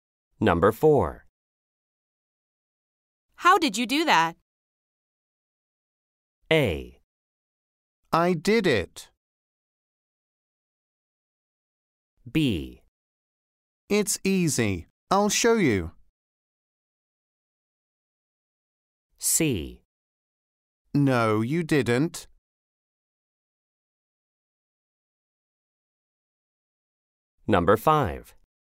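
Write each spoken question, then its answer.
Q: How did you do that?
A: B: It's easy. I'll show you.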